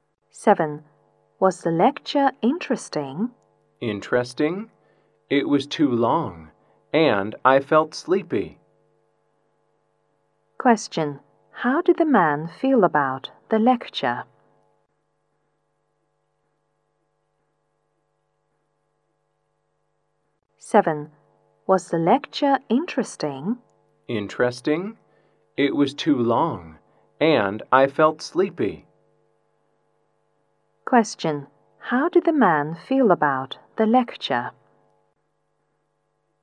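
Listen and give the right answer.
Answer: It was boring; too long and he felt sleepy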